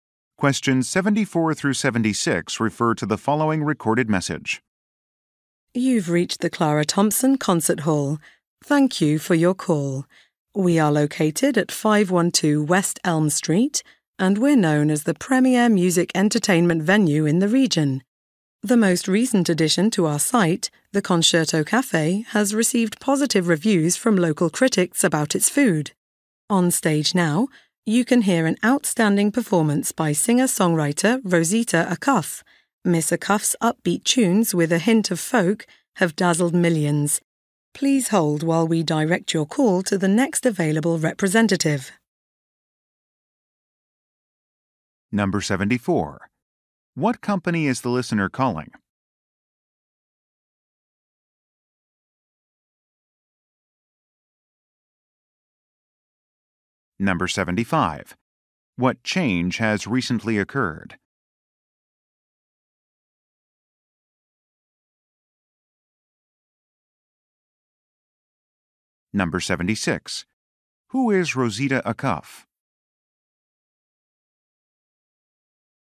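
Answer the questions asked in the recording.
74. A concert hall
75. A cafe was added
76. A singer-songwriter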